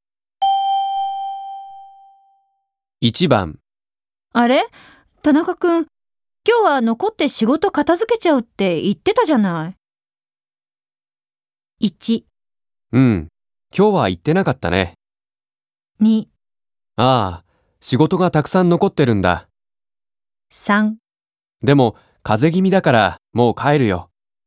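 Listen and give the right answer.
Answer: 3: でも、風邪気味だから、もう帰るよ。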